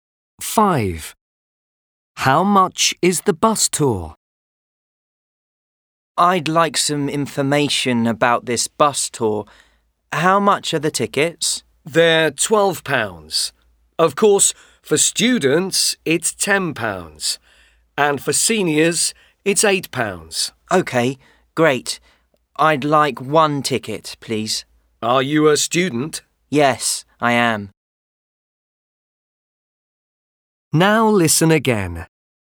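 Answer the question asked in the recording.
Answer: £10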